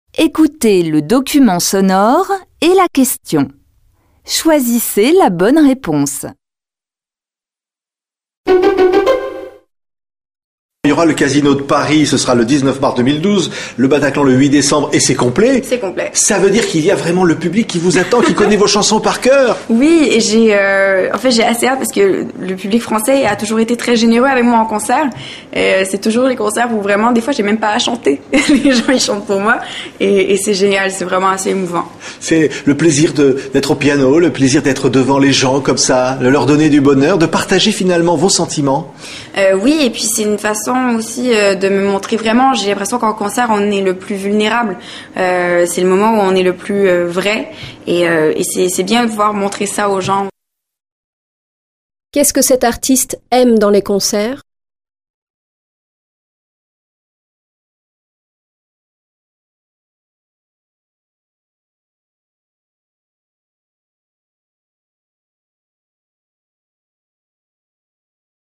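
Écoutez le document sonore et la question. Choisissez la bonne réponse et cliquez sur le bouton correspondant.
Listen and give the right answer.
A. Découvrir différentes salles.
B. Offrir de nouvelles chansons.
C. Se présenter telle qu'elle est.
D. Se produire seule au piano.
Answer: C. Se présenter telle qu'elle est.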